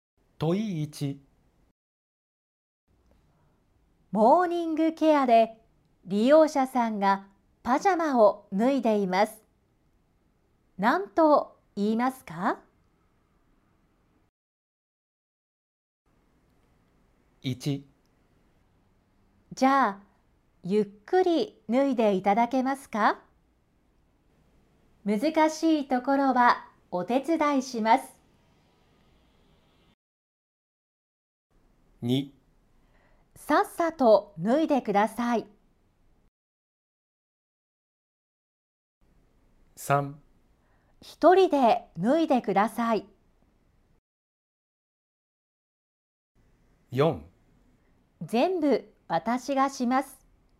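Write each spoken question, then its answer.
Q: 何と言いますか?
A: 1: じゃあゆっくり脱いでいただけますか?難しいところはお手伝いします。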